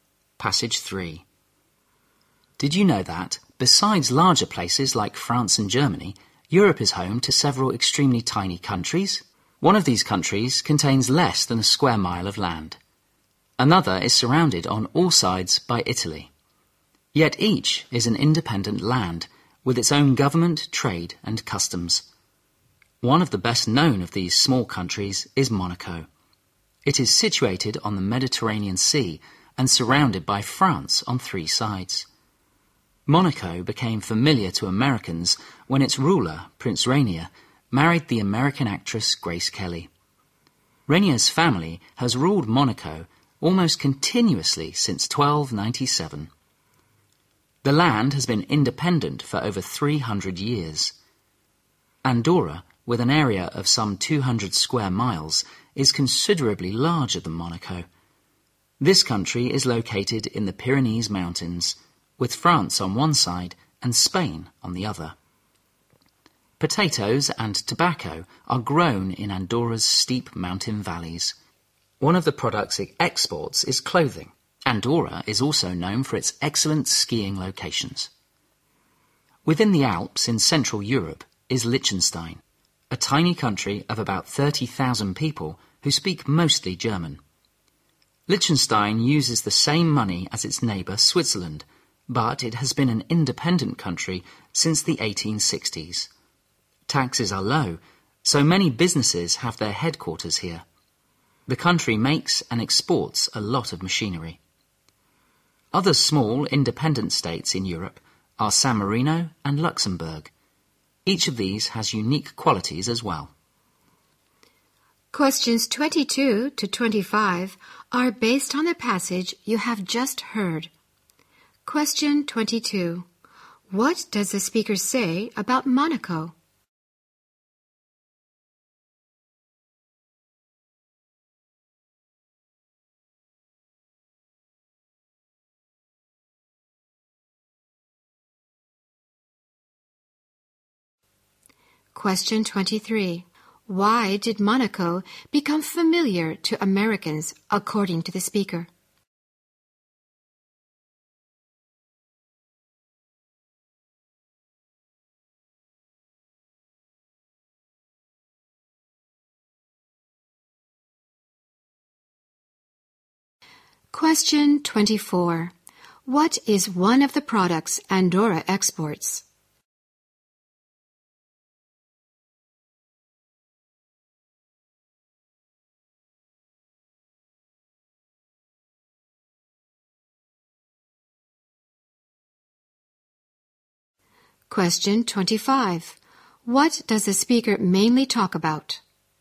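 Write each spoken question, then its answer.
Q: What does the speaker say about Monaco?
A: It is on the Mediterranean, surrounded by France on three sides, and ruled by Rainier's family since 1297

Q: Why did Monaco become familiar to Americans, according to the speaker?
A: Its ruler Prince Rainier married American actress Grace Kelly

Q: What is one of the products Andorra exports?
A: Clothing

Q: What does the speaker mainly talk about?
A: Some tiny independent countries in Europe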